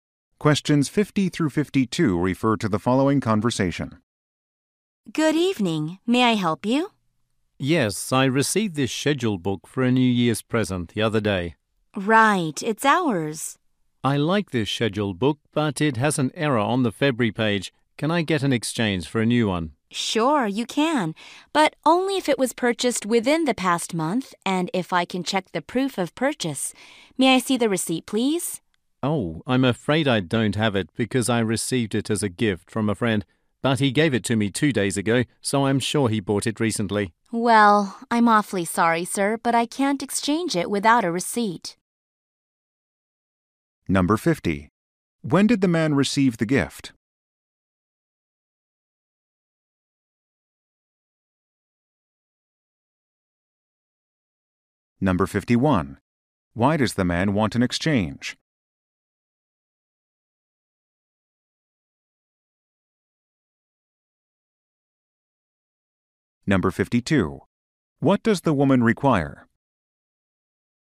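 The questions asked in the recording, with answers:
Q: When did the man receive the gift?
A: Two days ago

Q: Why does the man want an exchange?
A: It has an error on the February page

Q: What does the woman require?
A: A receipt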